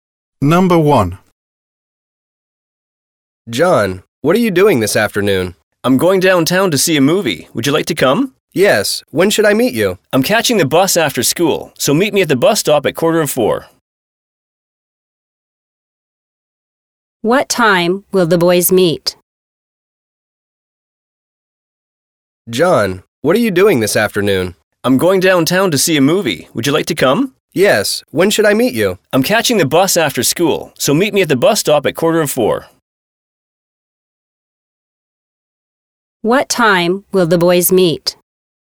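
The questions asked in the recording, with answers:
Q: What time will the boys meet?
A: 4:15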